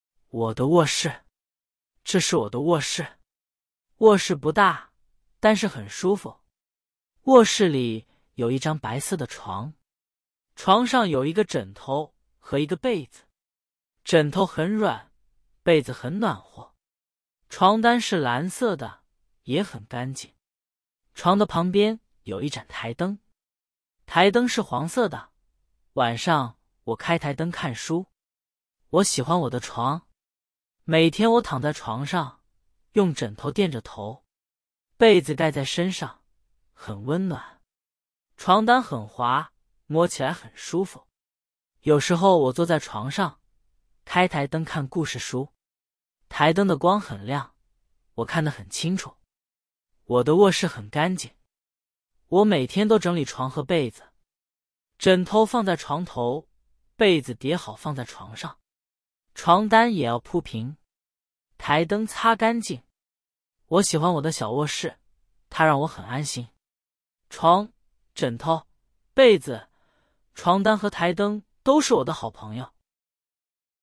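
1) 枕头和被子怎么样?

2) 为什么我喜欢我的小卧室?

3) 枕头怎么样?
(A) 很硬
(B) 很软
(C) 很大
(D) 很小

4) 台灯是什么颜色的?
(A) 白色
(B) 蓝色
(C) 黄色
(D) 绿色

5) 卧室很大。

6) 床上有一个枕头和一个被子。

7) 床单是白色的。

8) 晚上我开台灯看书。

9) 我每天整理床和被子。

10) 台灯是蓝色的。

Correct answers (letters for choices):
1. 枕头很软,被子很暖和
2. 它让我很安心
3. B
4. C
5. False
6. True
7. False
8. True
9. True
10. False

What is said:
我的卧室
这是我的卧室。卧室不大,但是很舒服。卧室里有一张白色的床。枕头很软,被子很暖和。床单是蓝色的,也很干净。床的旁边有一盏台灯。台灯是黄色的,晚上我开台灯看书。
我喜欢我的床。每天我躺在床上,用枕头垫着头。被子盖在身上,很温暖。床单很滑,摸起来很舒服。有时候我坐在床上,开台灯看故事书。台灯的光很亮,我看得很清楚。
我每天都整理床和被子。枕头放在床头,被子叠好放在床上。床单也要铺平。台灯擦干净。我喜欢我的小卧室,它让我很安心。床、枕头、被子、床单和台灯都是我的好朋友。

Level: Beginner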